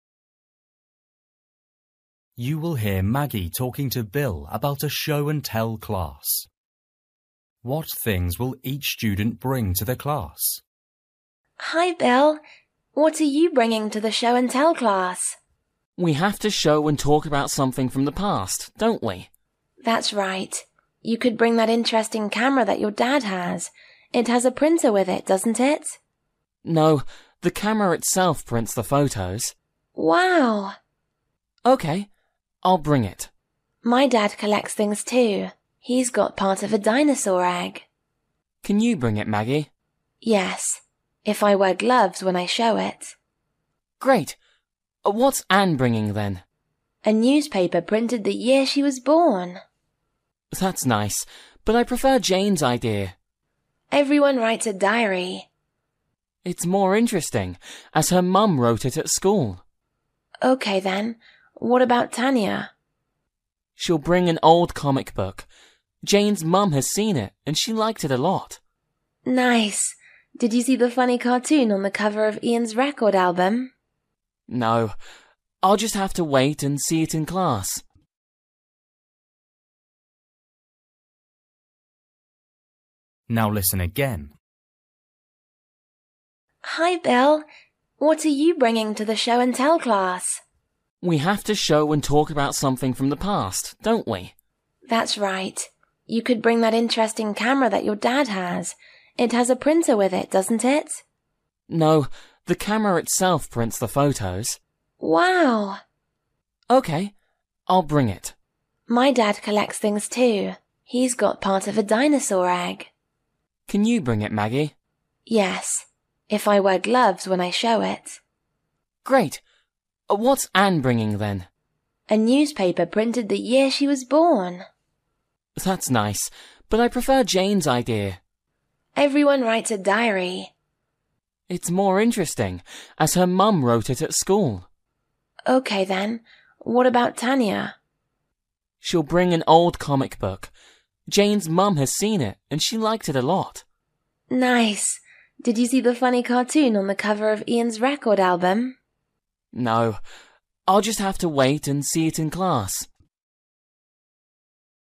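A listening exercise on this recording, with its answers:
For each question, choose the correct answer.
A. comic book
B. printer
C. diary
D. gloves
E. record album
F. dinosaur egg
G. camera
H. newspaper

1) Maggie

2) Ann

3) Jane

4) Tania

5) Ian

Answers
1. F
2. H
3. C
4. A
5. E

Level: Luyện nghe trình độ A2

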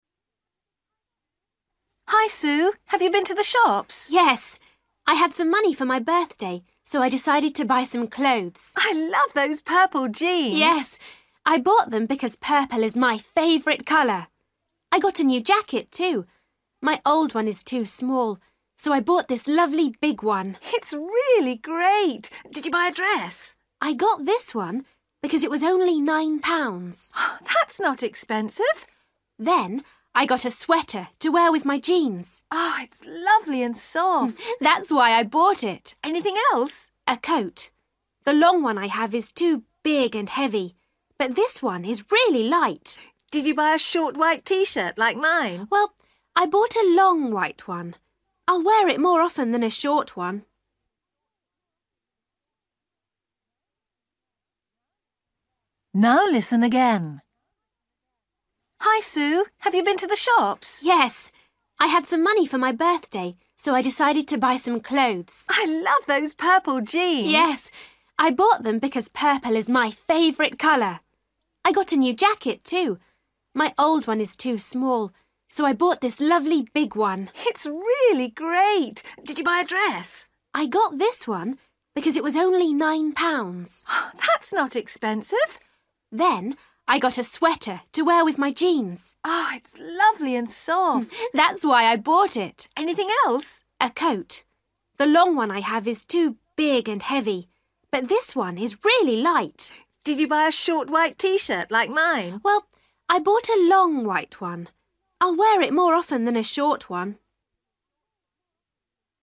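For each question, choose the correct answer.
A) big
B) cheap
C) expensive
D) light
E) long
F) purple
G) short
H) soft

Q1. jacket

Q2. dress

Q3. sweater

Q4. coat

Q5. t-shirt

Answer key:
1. A
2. B
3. H
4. D
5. E

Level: Luyện nghe trình độ A2

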